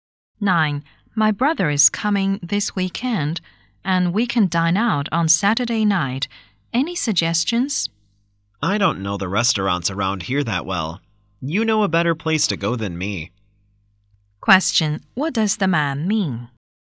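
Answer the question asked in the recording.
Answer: The woman should choose the restaurant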